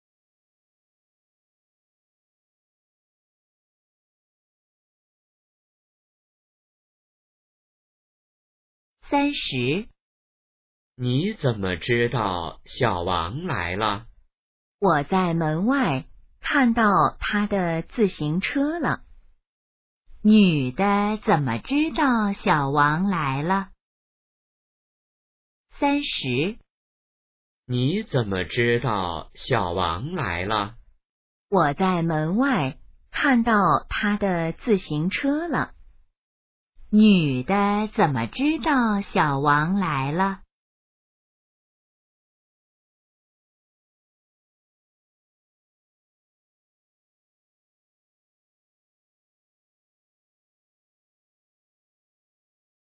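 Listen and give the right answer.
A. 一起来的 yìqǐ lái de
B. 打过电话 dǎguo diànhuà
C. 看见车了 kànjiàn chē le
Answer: C. 看见车了 kànjiàn chē le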